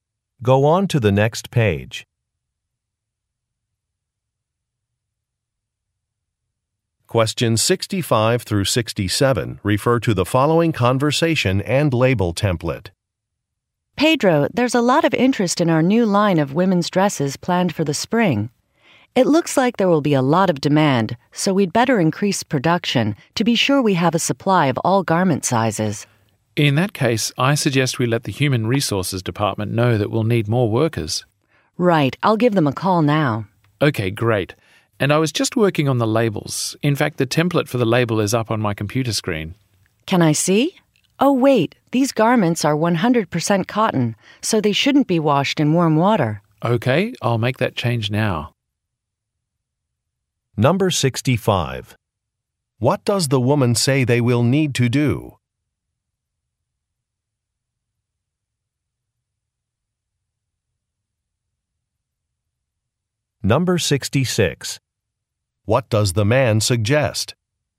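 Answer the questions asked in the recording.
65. Increase production
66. Telling Human Resources they need more workers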